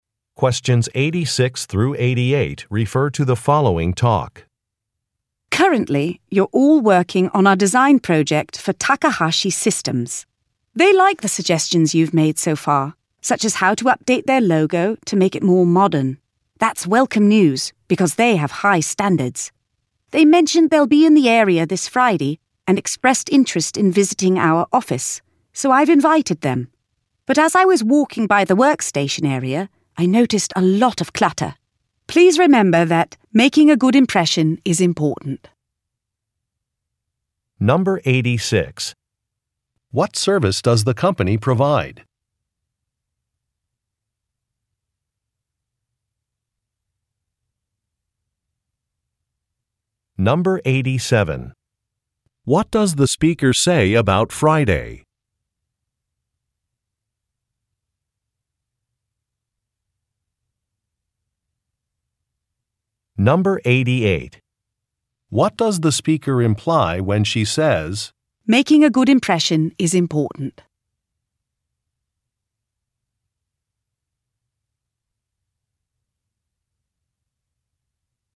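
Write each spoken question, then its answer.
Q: What service does the company provide?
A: Design services (e.g., logo design)

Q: What does the speaker say about Friday?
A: Clients from Takahashi Systems will visit the office

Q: What does the speaker imply when she says, "Making a good impression is important"?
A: Employees should clean up the cluttered workstation area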